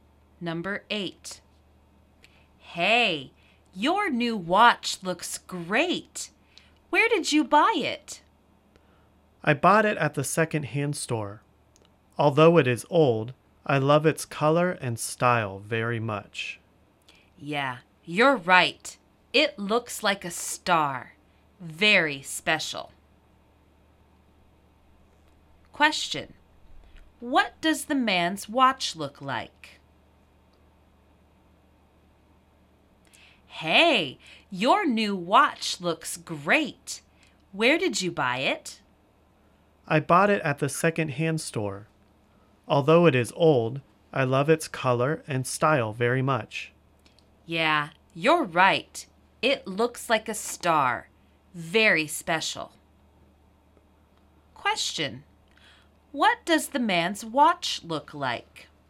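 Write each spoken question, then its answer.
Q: What does the man's watch look like?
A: It looks like a star.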